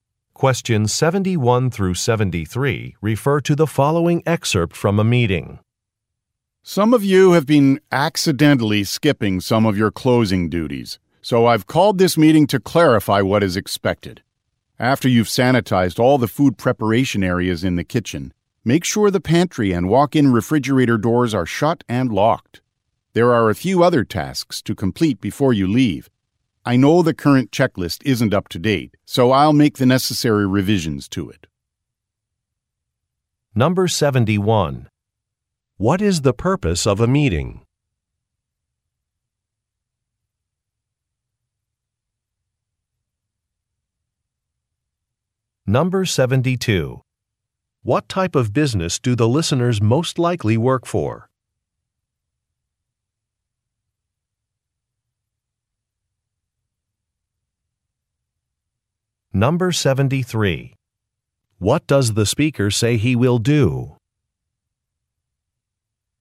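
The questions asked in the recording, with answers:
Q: What is the purpose of a meeting?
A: To clarify the closing duties that staff have been skipping

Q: What type of business do the listeners most likely work for?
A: A restaurant

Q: What does the speaker say he will do?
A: Revise the checklist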